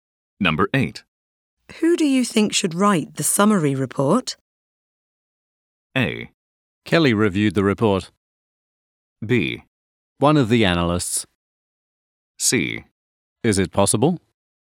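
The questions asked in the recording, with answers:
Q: Who do you think should write the summary report?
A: B: One of the analysts.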